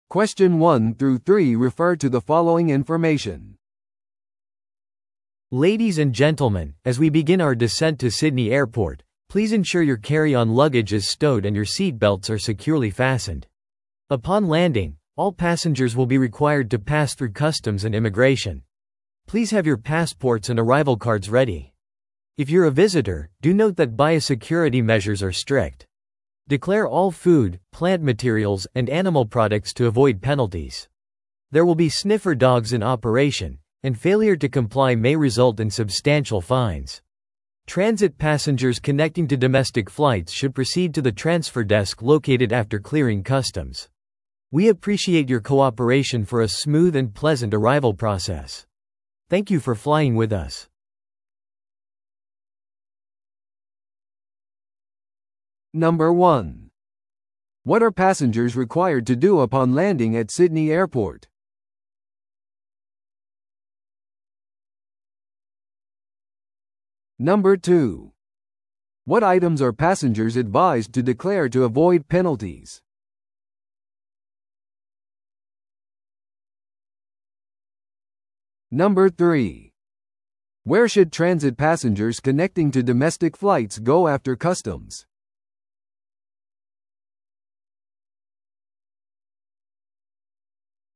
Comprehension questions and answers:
Listen to the audio below and answer the questions.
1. What are passengers required to do upon landing at Sydney Airport?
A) 航空会社のデスクに報告する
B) デジタル渡航申告を提出する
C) 税関と入国審査を通る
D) 搭乗券を受け取る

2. What items are passengers advised to declare to avoid penalties?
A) 電子機器と貴重品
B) 食品、植物材料、動物製品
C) 個人の薬とトイレタリー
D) 旅程とホテル予約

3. Where should transit passengers connecting to domestic flights go after customs?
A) 手荷物受取所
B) 外貨両替所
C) 乗り継ぎカウンター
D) 空港の出口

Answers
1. C
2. B
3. C

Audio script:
Ladies and gentlemen, as we begin our descent to Sydney Airport, please ensure your carry-on luggage is stowed and your seatbelts are securely fastened. Upon landing, all passengers will be required to pass through customs and immigration. Please have your passports and arrival cards ready. If you're a visitor, do note that biosecurity measures are strict. Declare all food, plant materials, and animal products to avoid penalties. There will be sniffer dogs in operation, and failure to comply may result in substantial fines. Transit passengers connecting to domestic flights should proceed to the transfer desk located after clearing customs. We appreciate your cooperation for a smooth and pleasant arrival process. Thank you for flying with us.

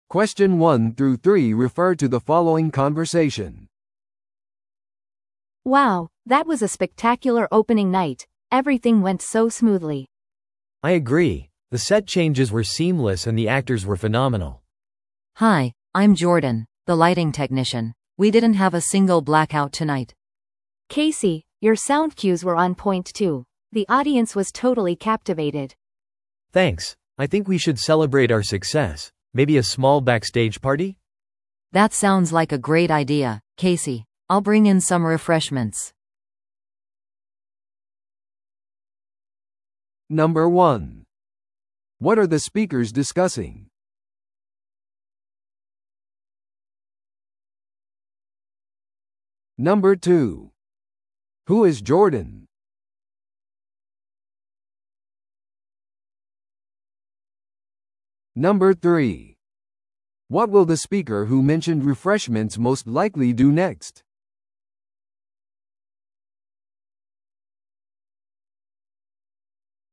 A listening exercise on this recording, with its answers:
Listen to the audio below and answer the questions.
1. What are the speakers discussing?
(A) 公演中の技術的な問題。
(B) 初日の成功。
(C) 新しい照明技術者の採用。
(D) 大規模な公開イベントの組織。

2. Who is Jordan?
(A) セットデザイナー。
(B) 音響エンジニア。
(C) 劇の俳優。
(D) 照明技術者。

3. What will the speaker who mentioned refreshments most likely do next?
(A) 次の公演の準備をする。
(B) パーティーのために軽食を持ってくる。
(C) 舞台裏の照明の問題を修正する。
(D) 初日のレビューを書く。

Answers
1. B
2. D
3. B

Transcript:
A: Wow, that was a spectacular opening night! Everything went so smoothly.
B: I agree. The set changes were seamless and the actors were phenomenal.
C: Hi, I'm Jordan, the lighting technician. We didn't have a single blackout tonight!
A: Casey, your sound cues were on point too. The audience was totally captivated.
B: Thanks. I think we should celebrate our success. Maybe a small backstage party?
C: That sounds like a great idea, Casey. I'll bring in some refreshments!

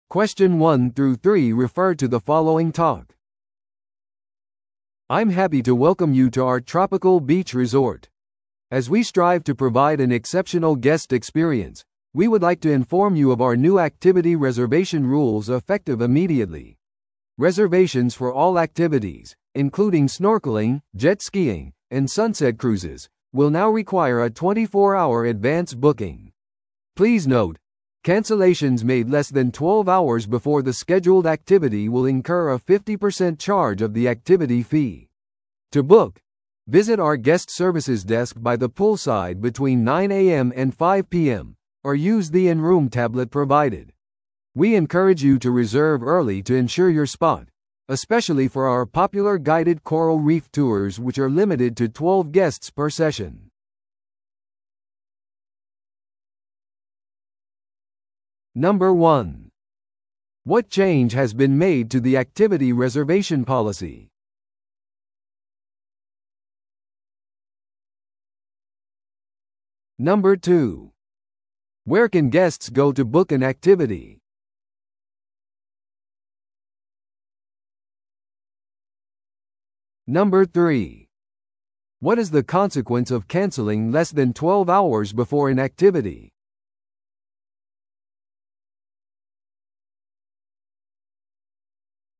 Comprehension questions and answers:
Listen to the audio below and answer the questions.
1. What change has been made to the activity reservation policy?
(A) 即時予約が可能になりました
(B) 支払いは現金のみ必要です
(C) 24時間前の事前予約が必要になりました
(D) キャンセルは無料です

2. Where can guests go to book an activity?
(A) リゾートの入口で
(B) ウェブサイトを通してオンラインで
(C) プールサイドのゲストサービスデスクで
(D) 近くの島のツアーオフィスで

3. What is the consequence of canceling less than 12 hours before an activity?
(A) 将来のアクティビティを予約することができません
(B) アクティビティ料金全額返金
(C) 他の時間帯に変更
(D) アクティビティ料金の50%の料金が発生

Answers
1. C
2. C
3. D

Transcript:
I'm happy to welcome you to our tropical beach resort. As we strive to provide an exceptional guest experience, we would like to inform you of our new activity reservation rules effective immediately. Reservations for all activities, including snorkeling, jet skiing, and sunset cruises, will now require a 24-hour advance booking. Please note, cancellations made less than 12 hours before the scheduled activity will incur a 50% charge of the activity fee. To book, visit our guest services desk by the poolside between 9am and 5pm, or use the in-room tablet provided. We encourage you to reserve early to ensure your spot, especially for our popular guided coral reef tours which are limited to 12 guests per session.

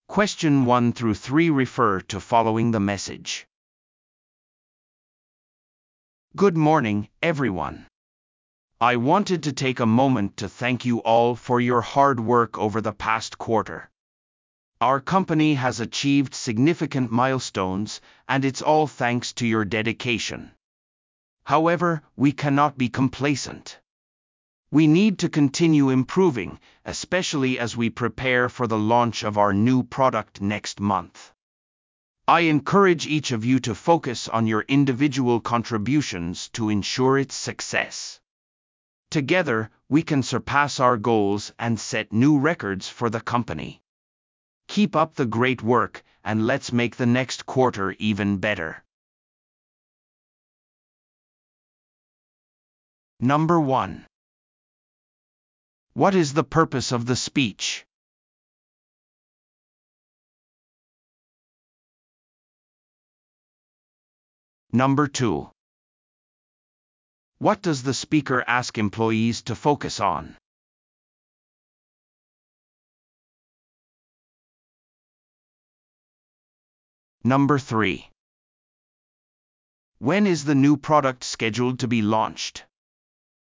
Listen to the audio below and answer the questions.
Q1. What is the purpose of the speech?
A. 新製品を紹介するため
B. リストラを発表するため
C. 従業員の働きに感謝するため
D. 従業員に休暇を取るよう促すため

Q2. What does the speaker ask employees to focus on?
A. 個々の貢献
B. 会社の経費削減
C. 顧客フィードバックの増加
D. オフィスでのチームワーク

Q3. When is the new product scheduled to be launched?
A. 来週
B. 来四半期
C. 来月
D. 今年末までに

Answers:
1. C
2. A
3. C

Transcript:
"Good morning, everyone. I wanted to take a moment to thank you all for your hard work over the past quarter. Our company has achieved significant milestones, and it's all thanks to your dedication. However, we cannot be complacent. We need to continue improving, especially as we prepare for the launch of our new product next month. I encourage each of you to focus on your individual contributions to ensure its success. Together, we can surpass our goals and set new records for the company. Keep up the great work, and let's make the next quarter even better."

